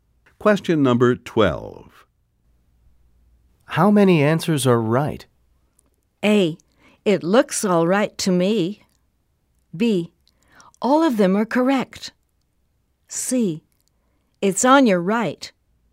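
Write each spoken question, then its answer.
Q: How many answers are right?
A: B: All of them are correct.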